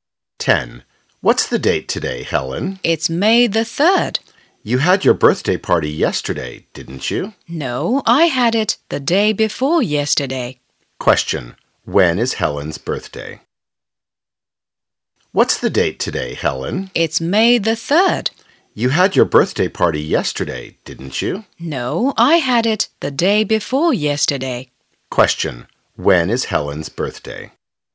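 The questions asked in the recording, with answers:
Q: When is Helen's birthday?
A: May 1st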